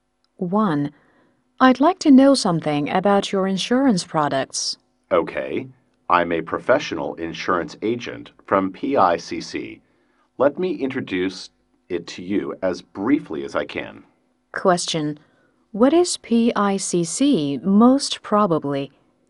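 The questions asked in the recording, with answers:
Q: What is PICC most probably?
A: An insurance company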